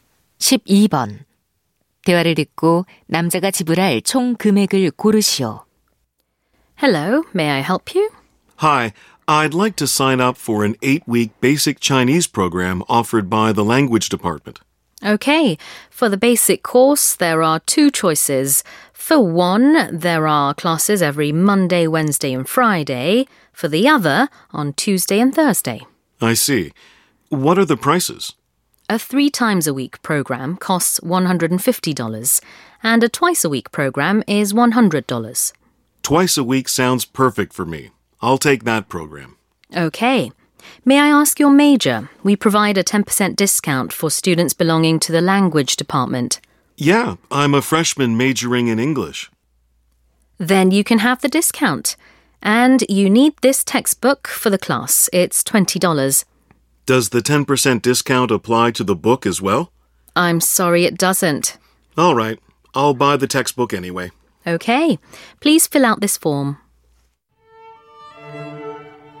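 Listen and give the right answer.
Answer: $110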